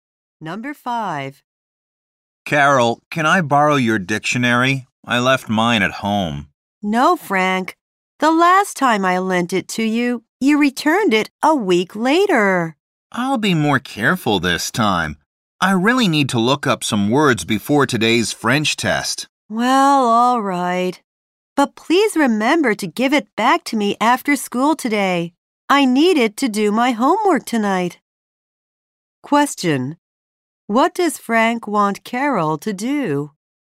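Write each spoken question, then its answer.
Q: What does Frank want Carol to do?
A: Lend him her dictionary.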